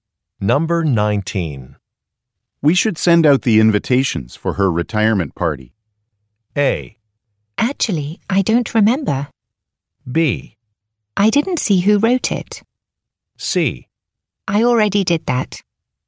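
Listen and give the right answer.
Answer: C: I already did that.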